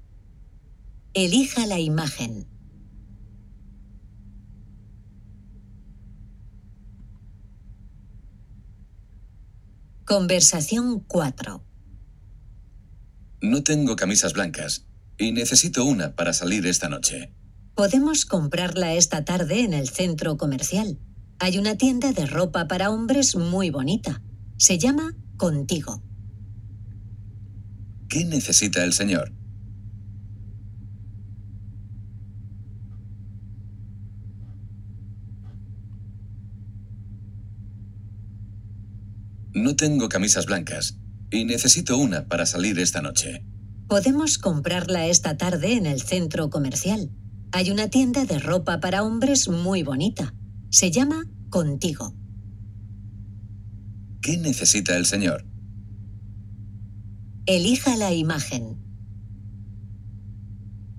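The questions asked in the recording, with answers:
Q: ¿Qué necesita el señor?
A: Una camisa blanca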